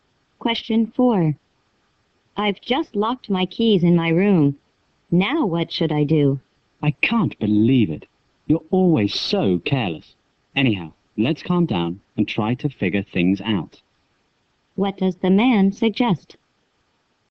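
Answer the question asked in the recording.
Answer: Calm down and try to figure out what to do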